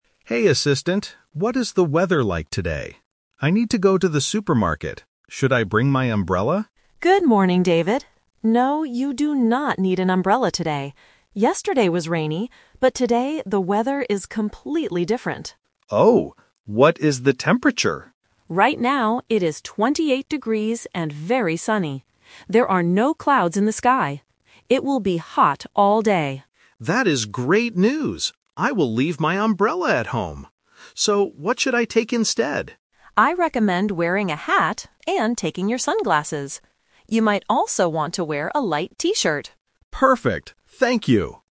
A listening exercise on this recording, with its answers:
Listen to the conversation and choose the best answer (A, B, or C).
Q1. What did David initially think about the weather?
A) He thought it would be sunny.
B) He thought he needed an umbrella.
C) He thought it would be 28 degrees.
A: B) He thought he needed an umbrella.

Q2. What is the weather like today?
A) Rainy and cloudy.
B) Cold and windy.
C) Sunny and hot.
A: C) Sunny and hot.

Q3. What does the Assistant advise David to take?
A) A hat and sunglasses.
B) An umbrella and a raincoat.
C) A thick coat and a hat.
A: A) A hat and sunglasses.

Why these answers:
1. David asks at the beginning, "Should I bring my umbrella?" because he expected rain (like yesterday). Option (A) is the trap because sunny is the actual weather, not what he initially thought. Option (C) is a trap using the actual temperature.
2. The Assistant clearly states, "Right now, it is 28 degrees and very sunny... It will be hot all day." Option (A) is the trap because the Assistant mentions "Yesterday was rainy." Option (B) is never mentioned.
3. The Assistant advises, "I recommend wearing a hat and taking your sunglasses." Option (B) is the trap because it was David's initial plan, but the Assistant rejected it ("No, you do not need an umbrella today"). Option (C) is a plausible clothing choice but is not mentioned in the audio.

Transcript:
User: Hey Assistant, what is the weather like today? I need to go to the supermarket. Should I bring my umbrella?
Assistant: Good morning, David. No, you do not need an umbrella today. Yesterday was rainy, but today the weather is completely different.
User: Oh? What is the temperature?
Assistant: Right now, it is 28 degrees and very sunny. There are no clouds in the sky. It will be hot all day.
User: That is great news! I will leave my umbrella at home. So, what should I take instead?
Assistant: I recommend wearing a hat and taking your sunglasses. You might also want to wear a light T-shirt.
User: Perfect. Thank you!

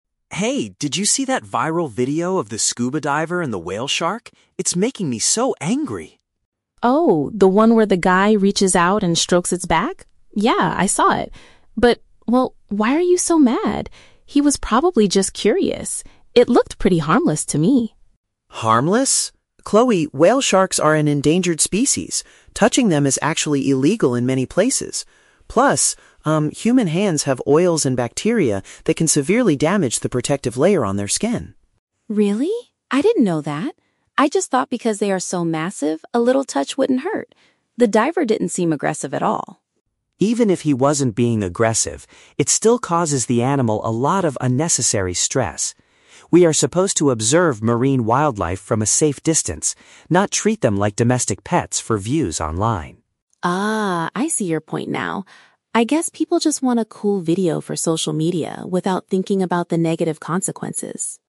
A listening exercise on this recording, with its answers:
Listen to a conversation between two friends discussing a viral video and choose the best answer (A, B, or C) for each question.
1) Why is Mark upset about the video he watched?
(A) He is mad because the diver was acting aggressively towards the shark.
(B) He thinks the person was swimming too close to a highly dangerous predator.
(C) He is angry because a tourist made physical contact with a rare sea creature.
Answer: (C) He is angry because a tourist made physical contact with a rare sea creature.

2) What is Chloe's initial opinion of the scuba diver's actions?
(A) She believes the person was just exploring and didn't mean any harm.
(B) She assumes the diver was trying to save the animal from a fishing net.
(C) She thinks he wanted to remove dangerous bacteria from the shark.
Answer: (A) She believes the person was just exploring and didn't mean any harm.

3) According to Mark, how can touching a whale shark physically harm it?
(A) It can cause them to swim away and get lost in the ocean.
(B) It can destroy the natural defense system on the animal's body.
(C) It can make them behave strangely, like domestic pets.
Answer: (B) It can destroy the natural defense system on the animal's body.

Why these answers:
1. Mark is angry because the diver "strokes its back" and mentions that whale sharks are "an endangered species." Option C paraphrases this as making "physical contact with a rare sea creature." Why the trap is wrong: Option (A) is a trap. Chloe explicitly states that the diver "didn't seem aggressive at all," and Mark agrees ("Even if he wasn't being aggressive..."). Option (B) is a plausible guess for a shark video, but whale sharks are not described as dangerous predators in the audio.
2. At the beginning, Chloe defends the diver by saying he "was probably just curious" and it "looked pretty harmless." Option A paraphrases this as "exploring and didn't mean any harm." Why the trap is wrong: Option (C) is a trap. Mark mentions "bacteria," but he says human hands have bacteria that hurt the shark, not that the diver was trying to remove bacteria. Option (B) is a plausible ocean rescue scenario but is never mentioned.
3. Mark explains that oils and bacteria from human hands can "damage the protective layer on their skin." Option B paraphrases this as destroying the "natural defense system on the animal's body." Why the trap is wrong: Option (C) is a trap. Mark says we should not "treat them like domestic pets," but this is a criticism of human behavior, not a physical harm caused to the shark. Option (A) is a plausible stress reaction, but it is not mentioned in the audio.

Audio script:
Mark: Hey, did you see that viral video of the scuba diver and the whale shark? It's making me so angry!
Chloe: Oh, the one where the guy reaches out and strokes its back? Yeah, I saw it. But, well, why are you so mad? He was probably just curious. It looked pretty harmless to me.
Mark: Harmless? Chloe, whale sharks are an endangered species. Touching them is actually illegal in many places. Plus, um, human hands have oils and bacteria that can severely damage the protective layer on their skin.
Chloe: Really? I didn't know that. I just thought because they are so massive, a little touch wouldn't hurt. The diver didn't seem aggressive at all.
Mark: Even if he wasn't being aggressive, it still causes the animal a lot of unnecessary stress. We are supposed to observe marine wildlife from a safe distance, not treat them like domestic pets for views online.
Chloe: Ah, I see your point now. I guess people just want a cool video for social media without thinking about the negative consequences.

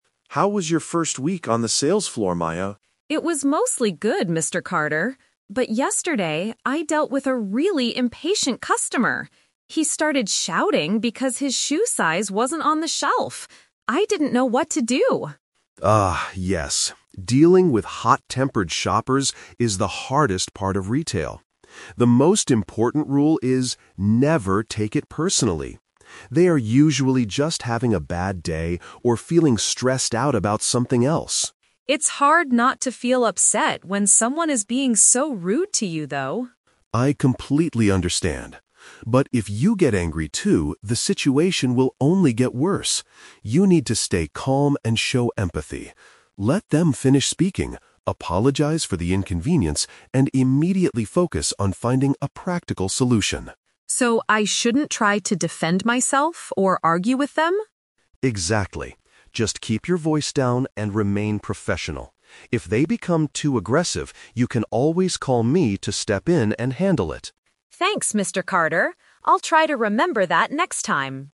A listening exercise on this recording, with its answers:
Listen to a conversation between a store manager and a new employee. For each question, choose the correct answer A, B, or (C)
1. What happened to Maya yesterday?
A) She could not find the right shoe size for herself.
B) She had to serve a very angry and rushed shopper.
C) She accidentally shouted at a customer in the store.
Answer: B) She had to serve a very angry and rushed shopper.

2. According to Mr. Carter, why do customers usually act this way?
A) They are personally angry with the store staff.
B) They are experiencing stress or a difficult day.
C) They enjoy making the retail employees feel upset.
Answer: B) They are experiencing stress or a difficult day.

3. What is the manager's main advice for handling rude people?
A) Control your emotions and focus on fixing the problem.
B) Argue back politely to show them that they are wrong.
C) Immediately ask the aggressive customer to leave the store.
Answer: A) Control your emotions and focus on fixing the problem.

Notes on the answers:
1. Maya says she dealt with a "really impatient customer" who "started shouting." The word "rushed" is a synonym for impatient, and someone who is shouting is usually "angry."
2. Mr. Carter explains that bad-tempered customers are "usually just having a bad day or feeling stressed out." Option B is a perfect paraphrase of this sentence.
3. The manager advises Maya to "stay calm" (control emotions) and "immediately focus on finding a practical solution" (fixing the problem).

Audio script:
Mr. Carter: How was your first week on the sales floor, Maya?
Maya: It was mostly good, Mr. Carter. But yesterday, I dealt with a really impatient customer. He started shouting because his shoe size wasn't on the shelf. I didn't know what to do.
Mr. Dealing with hot-tempered shoppers is the hardest part of retail. The most important rule is: never take it personally. They are usually just having a bad day or feeling stressed out about something else.
Maya: It's hard not to feel upset when someone is being so rude to you, though.
Mr. Carter: I completely understand. But if you get angry too, the situation will only get worse. You need to stay calm and show empathy. Let them finish speaking, apologize for the inconvenience, and immediately focus on finding a practical solution.
Maya: So I shouldn't try to defend myself or argue with them?
Mr. Carter: Exactly. Just keep your voice down and remain professional. If they become too aggressive, you can always call me to step in and handle it.

